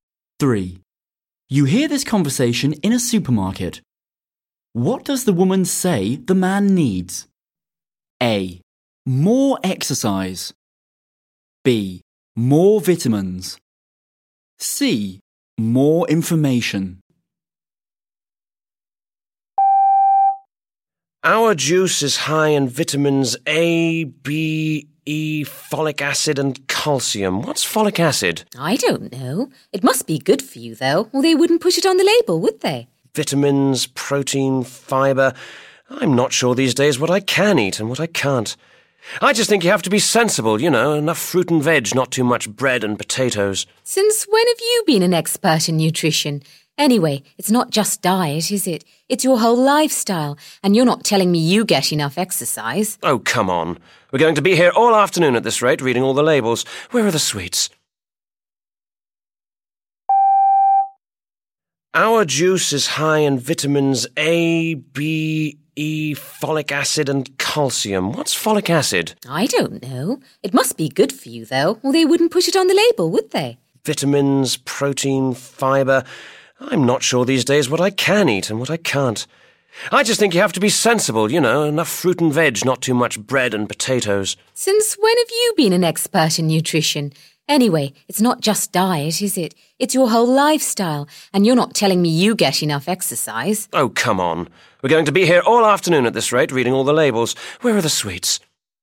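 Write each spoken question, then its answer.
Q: What does the woman say the man needs?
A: A: More exercise.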